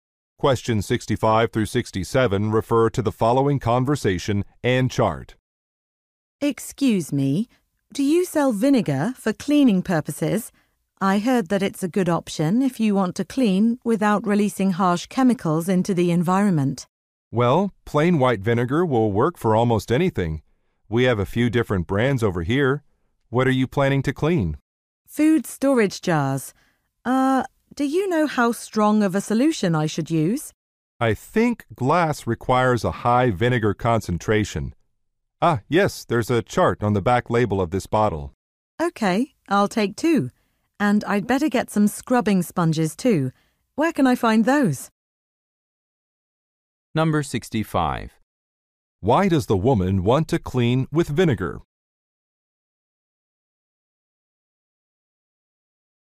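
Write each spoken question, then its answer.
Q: Why does the woman want to clean with vinegar?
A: To avoid releasing harsh chemicals into the environment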